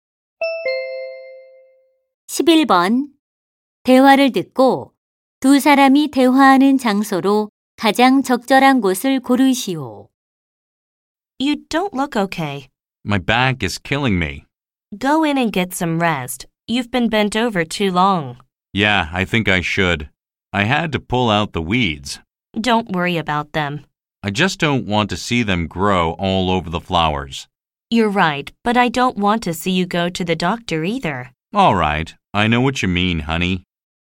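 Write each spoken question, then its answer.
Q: 대화를 듣고 두 사람이 대화하는 장소로 가장 적절한 곳을 고르시오.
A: 정원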